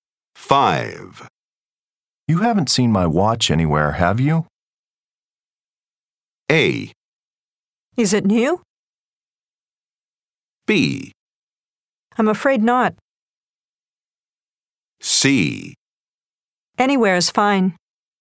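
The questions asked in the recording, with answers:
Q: You haven't seen my watch anywhere, have you?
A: B: I'm afraid not.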